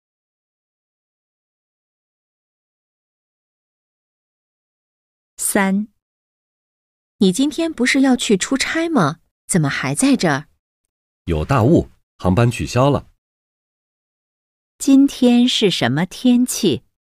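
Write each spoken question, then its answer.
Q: 今天是什么天气?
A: 有大雾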